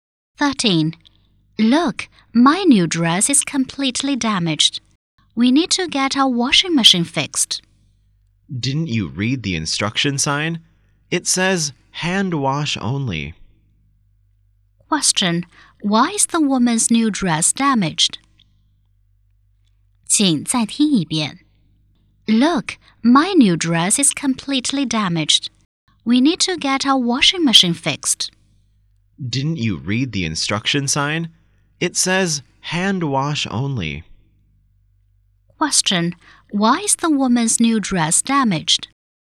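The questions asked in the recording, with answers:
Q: Question. Why is the woman's new dress damaged?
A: It was washed in the washing machine, but it should be washed by hand only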